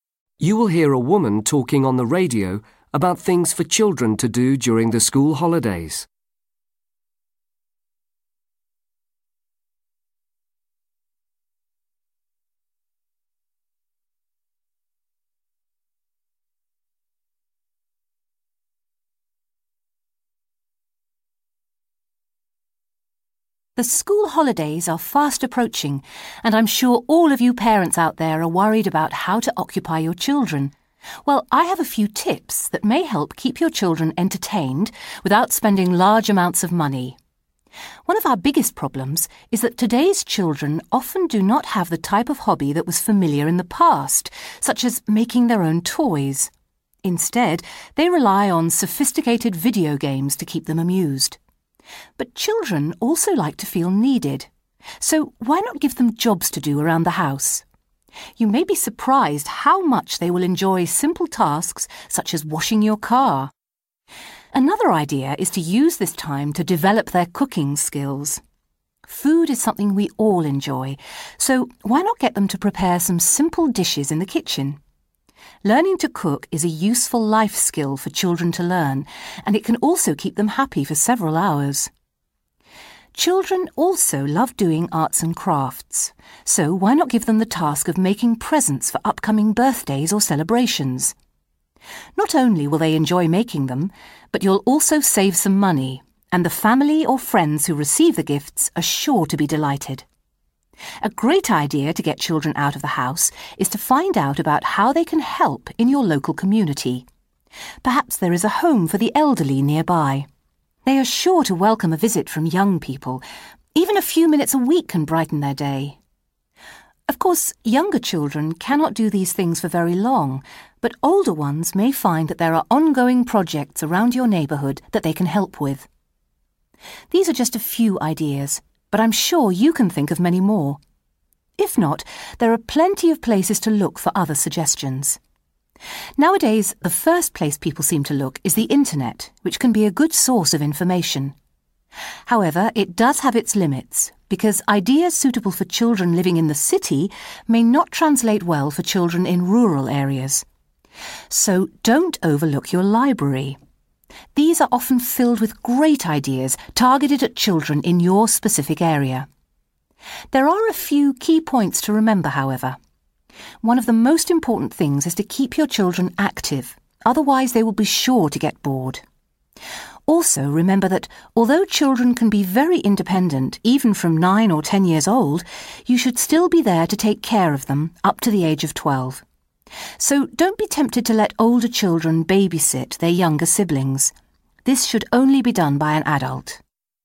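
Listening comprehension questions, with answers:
Complete the notes using NO MORE THAN ONE WORD AND/OR A NUMBER for each answer.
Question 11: Main problem – children do not have a traditional 11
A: hobby

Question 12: Give children jobs, for example cleaning the 12...........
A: car

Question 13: At home, ask children to help in the 13..................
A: kitchen

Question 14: Get children to make 14............... ahead of time.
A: presents

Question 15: Get children involved in community work such as visiting the 15..............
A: elderly

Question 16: Involve older children in long-term 16............ in your community.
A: projects

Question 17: You may get some ideas from the 17..............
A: internet

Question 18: The local 18............... is often the best place to find ideas.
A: library

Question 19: Make sure children stay 19..............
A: active

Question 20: Children up to the age of 20............... 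need to be supervised by an adult.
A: 12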